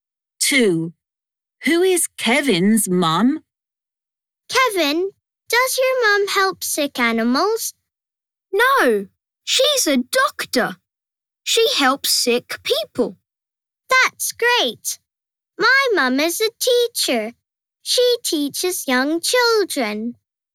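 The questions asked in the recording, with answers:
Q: Who is Kevin's mum?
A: a doctor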